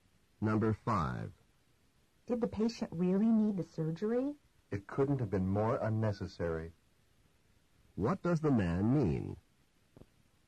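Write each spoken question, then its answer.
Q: What does the man mean?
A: The surgery was completely unnecessary.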